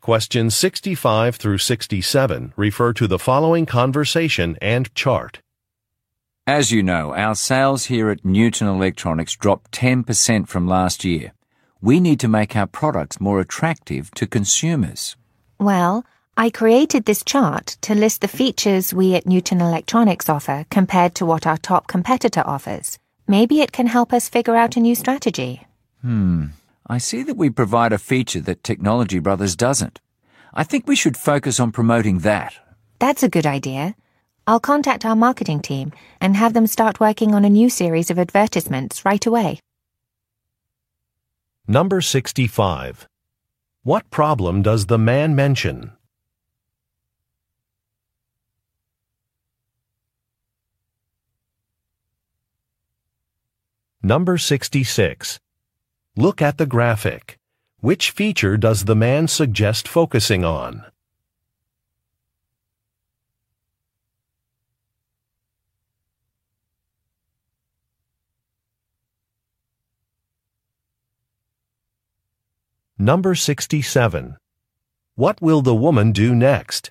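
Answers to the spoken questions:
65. Sales dropped 10% from last year
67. Contact the marketing team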